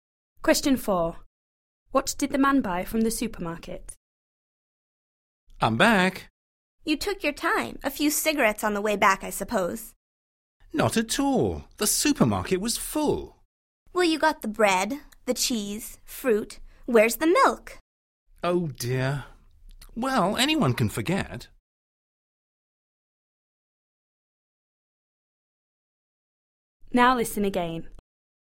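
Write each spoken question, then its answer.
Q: What did the man buy from the supermarket?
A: Bread, cheese and fruit (no milk)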